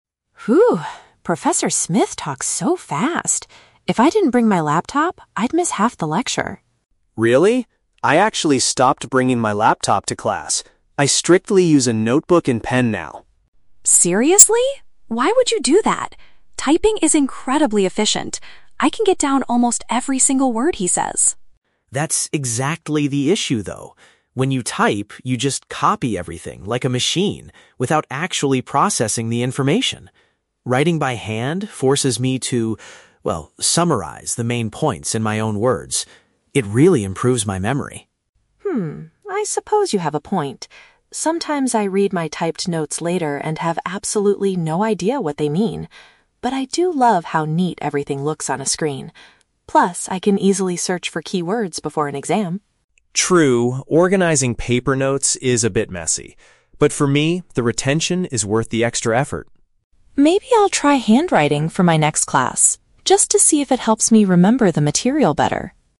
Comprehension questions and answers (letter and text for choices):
Listen to a conversation between two friends. For each question, choose the correct answer (A, B, or C).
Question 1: Why does Emma prefer using her laptop at the beginning of the conversation?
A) It helps her record the professor's voice.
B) She can capture the lesson's content much quicker.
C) It automatically summarizes the main points for her.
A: B) She can capture the lesson's content much quicker.

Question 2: What does Ryan believe is the main benefit of writing notes by hand?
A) It allows him to understand and recall the lesson better.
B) It keeps his study materials neatly organized.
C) It stops him from getting distracted by the internet.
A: A) It allows him to understand and recall the lesson better.

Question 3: What does Emma decide to do at the end?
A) She will teach Ryan how to search for keywords online.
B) She is willing to experiment with the traditional method.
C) She plans to type her notes and print them out later.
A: B) She is willing to experiment with the traditional method.

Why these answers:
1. Emma says that typing is "incredibly efficient" and allows her to "get down almost every single word." Option B uses the phrase "capture the lesson's content much quicker" to paraphrase this idea. Trap C is incorrect because Ryan is the one who mentions summarizing the main points (when writing by hand), not Emma's laptop. Trap A is plausible but is never mentioned in the audio.
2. Ryan says that writing by hand forces him to process the information and that it "improves my memory." Option A paraphrases this with the words "understand and recall." Trap B is incorrect because Ryan admits that his paper notes are "a bit messy." It is Emma who likes how "neat everything looks on a screen." Trap C is a very common reason to avoid laptops, but Ryan does not mention internet distractions in this conversation.
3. Emma says, "Maybe I'll try handwriting for my next class." Option B uses "experiment with the traditional method" as a synonym for trying handwriting. Trap A is incorrect. Emma mentions that she can search for keywords on her computer, but she never offers to teach Ryan how to do it. Trap C is not mentioned in the audio at all.

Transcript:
Professor Smith talks so fast. If I didn't bring my laptop, I'd miss half the lecture.
Ryan: Really? I actually stopped bringing my laptop to class. I strictly use a notebook and pen now.
Emma: Seriously? Why would you do that? Typing is incredibly efficient. I can get down almost every single word he says.
Ryan: That's exactly the issue, though. When you type, you just copy everything like a machine without actually processing the information. Writing by hand forces me to, well, summarize the main points in my own words. It really improves my memory.
Emma: Hmm... I suppose you have a point. Sometimes I read my typed notes later and have absolutely no idea what they mean. But I do love how neat everything looks on a screen. Plus, I can easily search for keywords before an exam.
Ryan: True, organizing paper notes is a bit messy. But for me, the retention is worth the extra effort.
Emma: Maybe I'll try handwriting for my next class... just to see if it helps me remember the material better.